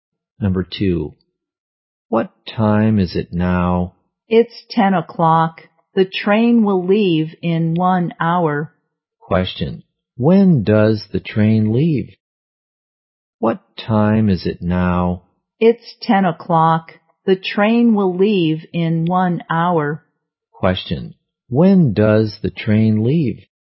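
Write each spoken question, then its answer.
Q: When does the train leave?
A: At 11 o'clock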